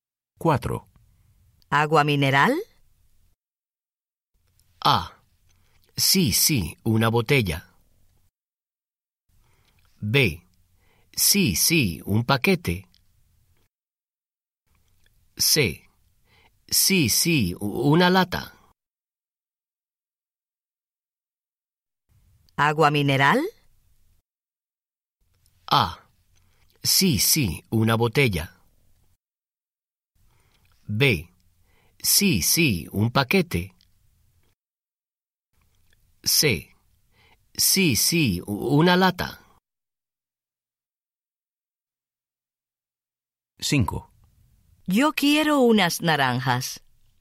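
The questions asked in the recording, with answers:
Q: ¿Agua mineral?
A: A: Sí, sí, una botella.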